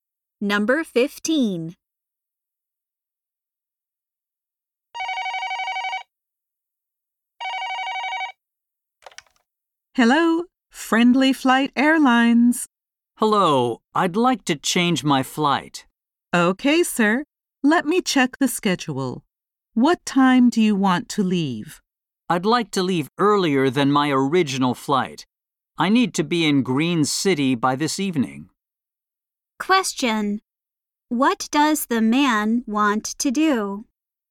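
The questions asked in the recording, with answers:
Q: What does the man want to do?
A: Change to an earlier flight.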